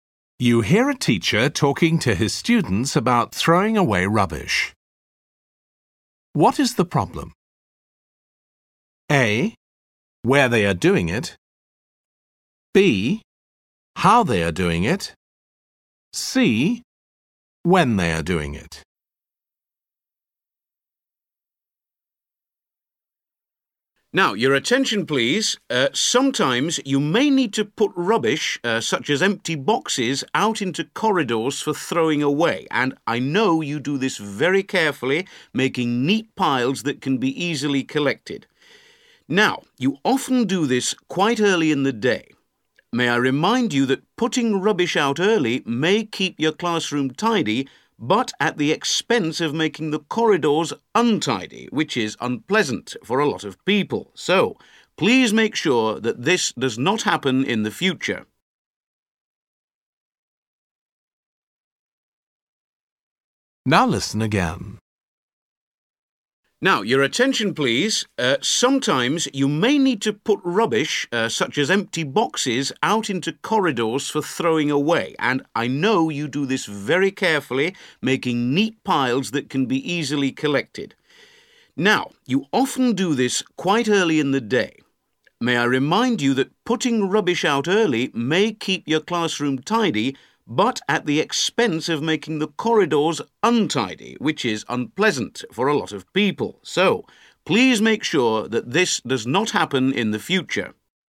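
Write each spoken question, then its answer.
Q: What is the problem?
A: C: When they are doing it.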